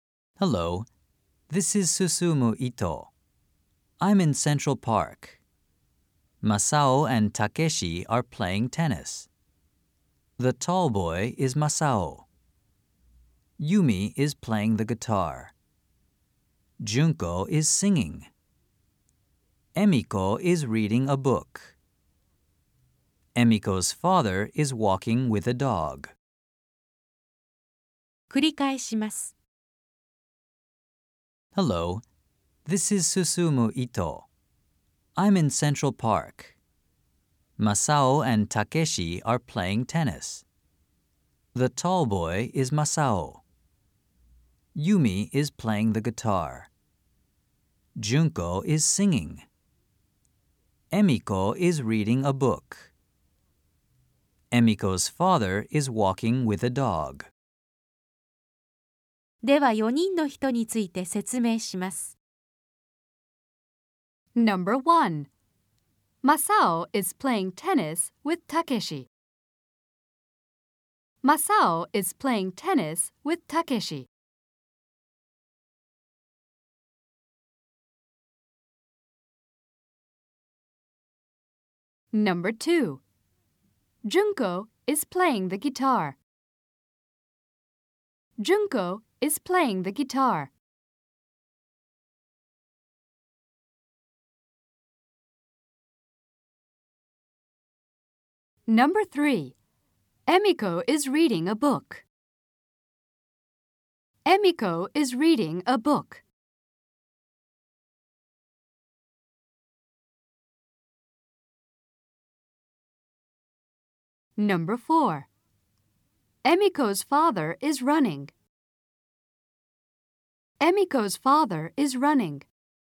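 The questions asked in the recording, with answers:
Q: Masao is playing tennis with Takeshi.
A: ○ (True)

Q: Junko is playing the guitar.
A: × (False)

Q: Emiko is reading a book.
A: ○ (True)

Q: Emiko's father is running.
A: × (False)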